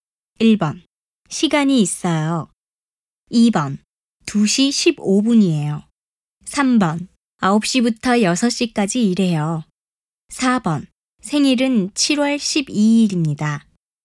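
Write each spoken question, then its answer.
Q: 지금 몇 시예요?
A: 2: 2시 15분이에요.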